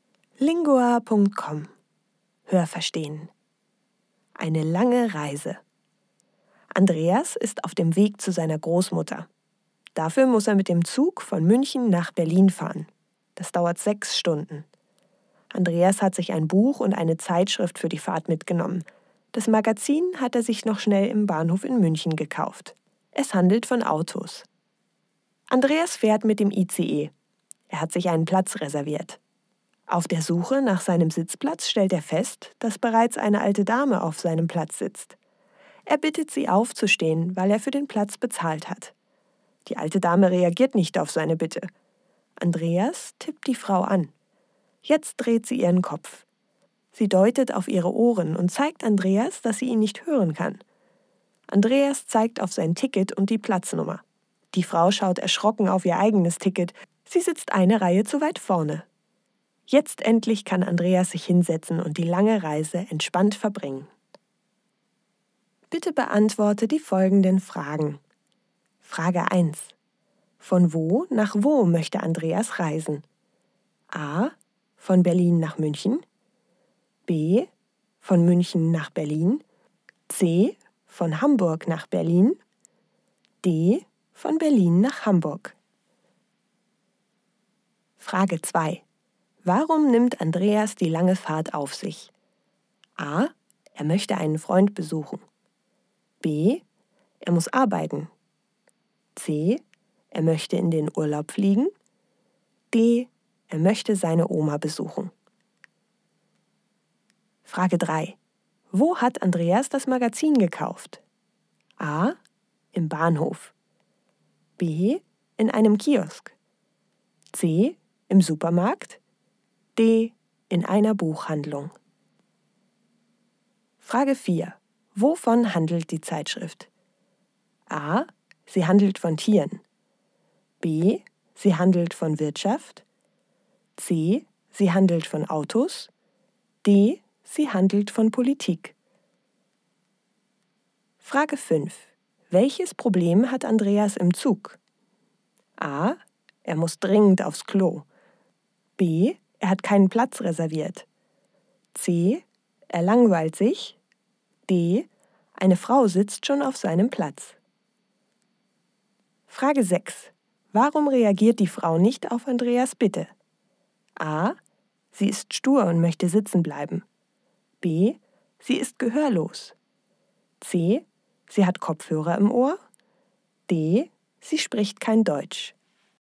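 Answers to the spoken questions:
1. B: Von München nach Berlin.
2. D: Er möchte seine Oma besuchen.
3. A: Im Bahnhof.
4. C: Sie handelt von Autos.
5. D: Eine Frau sitzt schon auf seinem Platz.
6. B: Sie ist gehörlos.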